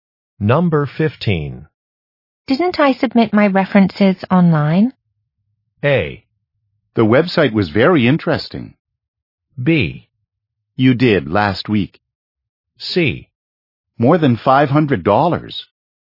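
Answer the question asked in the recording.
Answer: B: You did last week.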